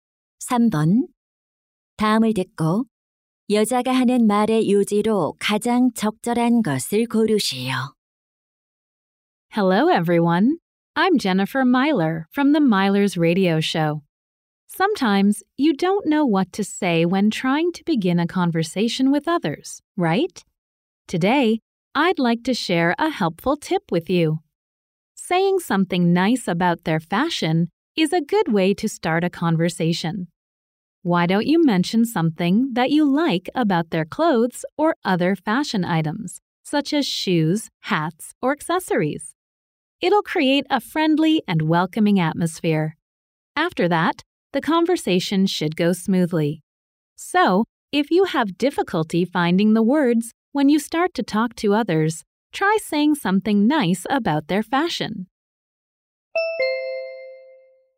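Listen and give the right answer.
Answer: 상대방의 패션을 칭찬하는 것은 대화를 시작하는 좋은 방법이다.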